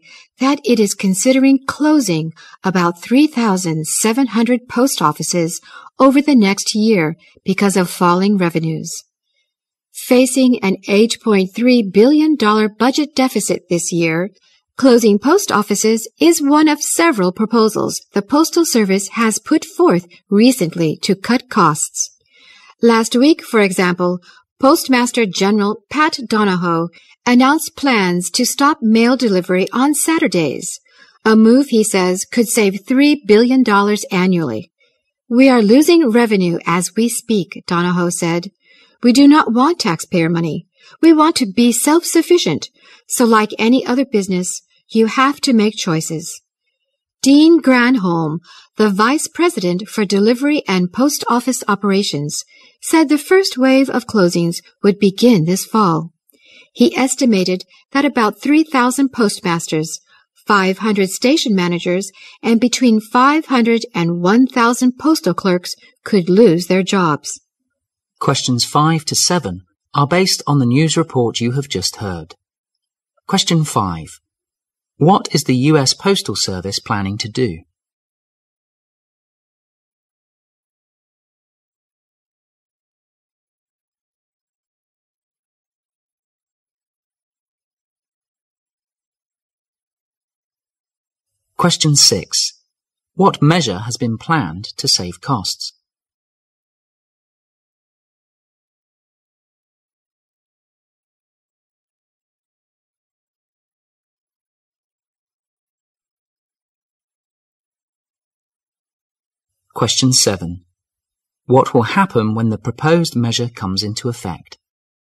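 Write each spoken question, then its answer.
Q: What is the U.S. Postal Service planning to do?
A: Close about 3,700 post offices over the next year

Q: What measure has been planned to save costs?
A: Stopping mail delivery on Saturdays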